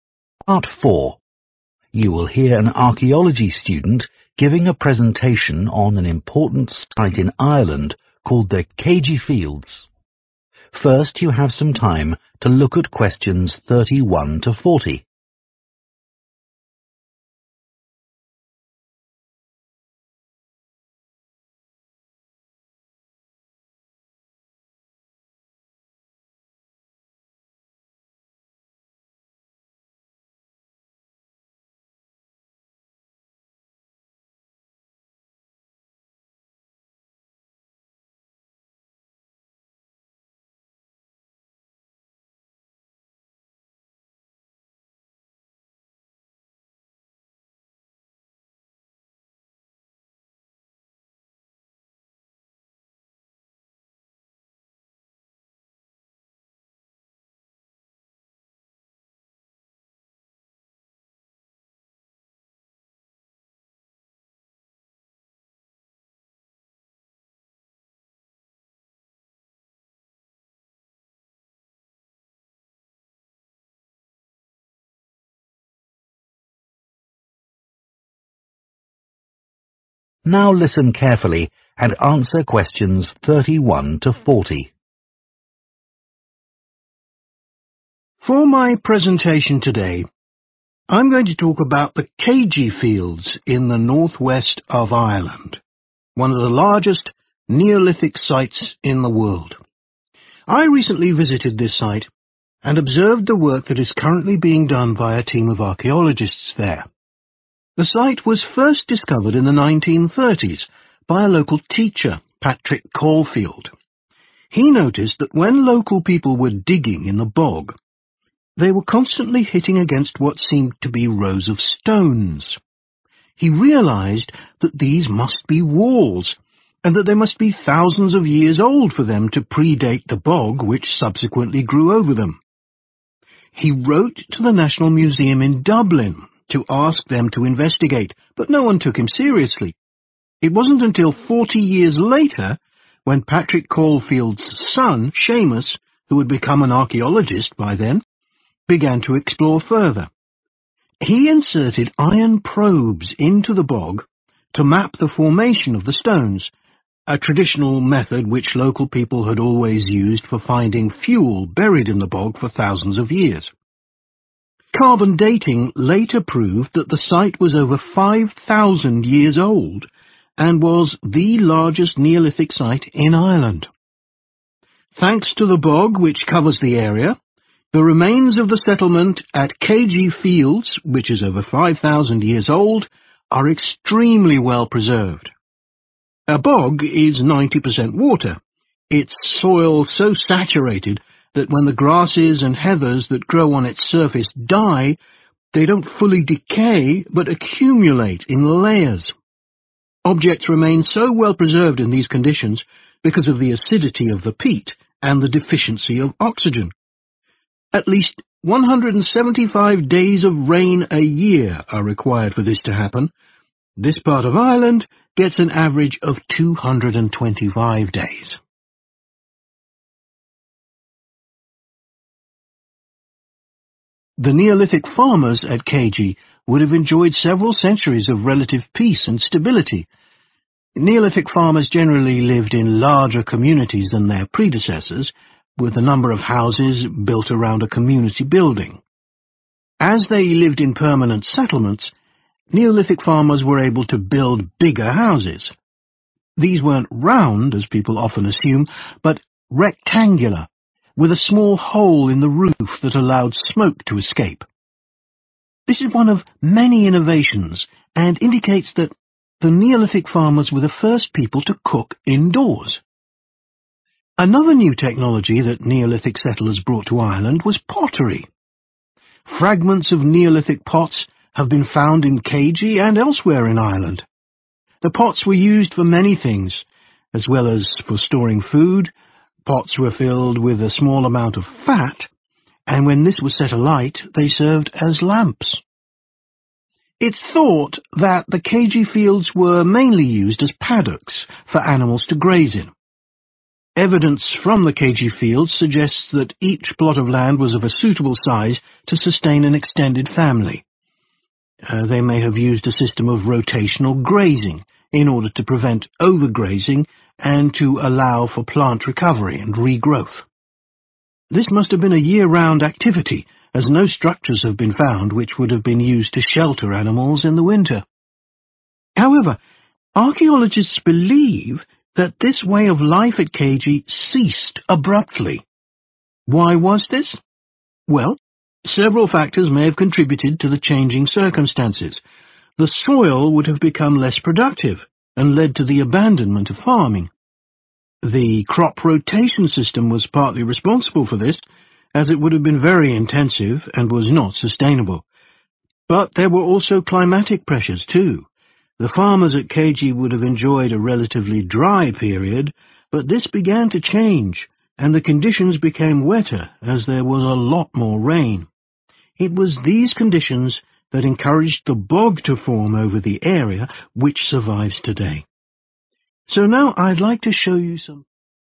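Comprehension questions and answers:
Complete the notes below. Write ONE WORD ONLY for each answer.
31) were once 31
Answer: walls

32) His 32 became an archaeologist and undertook an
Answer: son

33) a traditional method used by local people to dig for 33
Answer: fuel

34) Items are well preserved in the bog because of a lack of 34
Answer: oxygen

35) Houses were 35 in shape and had a hole in the roof.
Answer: rectangular

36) pots used for storage and to make 36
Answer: lamps

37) Each field at Céide was large enough to support a big 37.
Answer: family

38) evidence of structures to house them during 38 .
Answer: winter

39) a decline in 39 quality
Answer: soil

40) an increase in 40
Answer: rain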